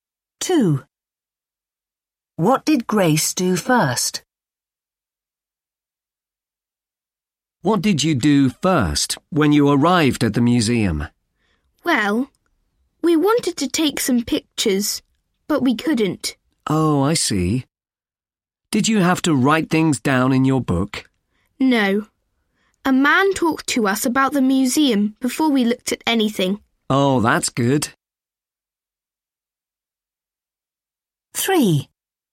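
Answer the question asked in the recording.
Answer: A man talked to them about the museum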